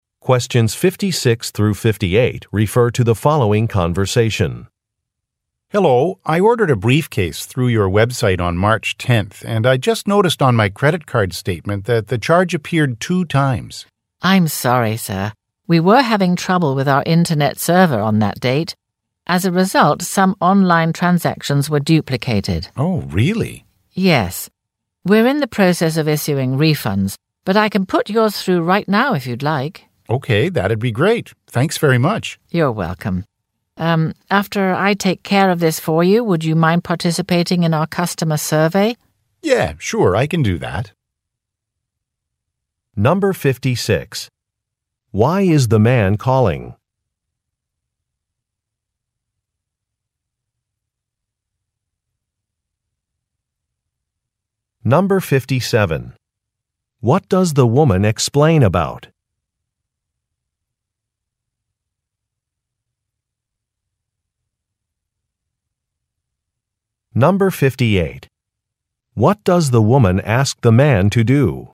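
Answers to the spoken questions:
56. He was charged twice for an online order.
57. A server problem caused some online transactions to be duplicated.
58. Take part in a customer survey.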